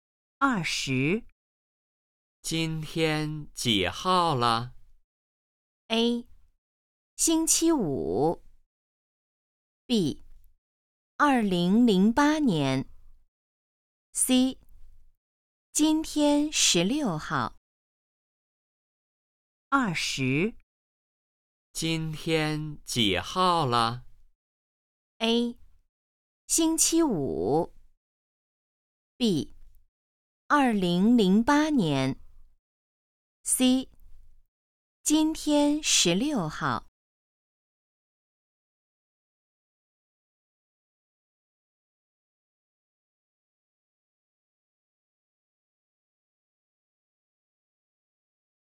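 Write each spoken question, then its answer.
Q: 今天几号了?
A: C: 今天十六号。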